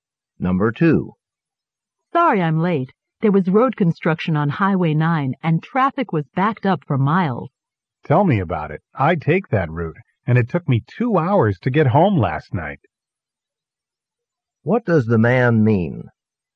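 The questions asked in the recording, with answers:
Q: What does the man mean?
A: He was also delayed by the traffic on Highway 9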